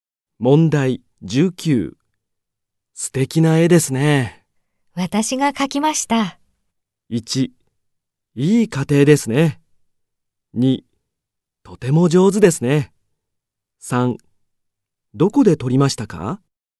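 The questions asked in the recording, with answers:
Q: 素敵な絵ですね。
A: 2: とても上手ですね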